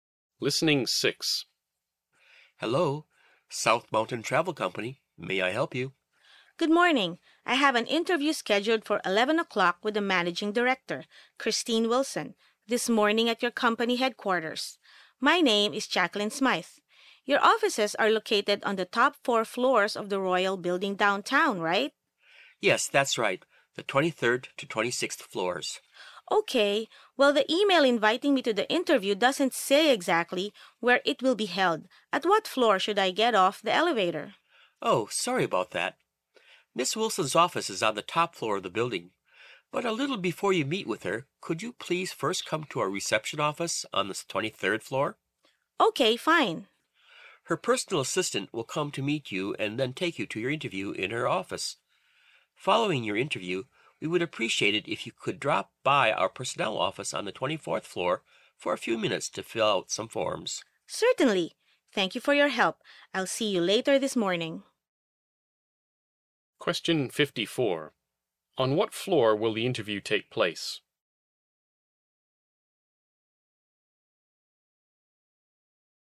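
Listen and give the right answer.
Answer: The top floor (26th floor)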